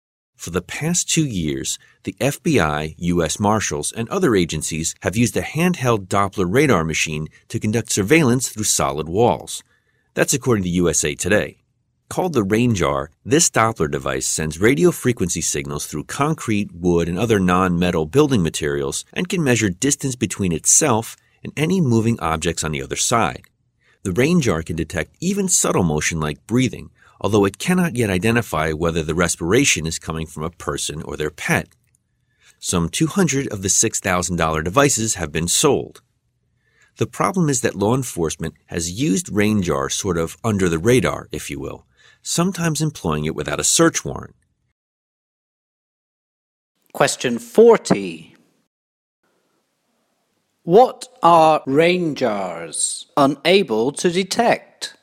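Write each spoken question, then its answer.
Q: What are RANGE-Rs unable to detect?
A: Whether the breathing comes from a person or a pet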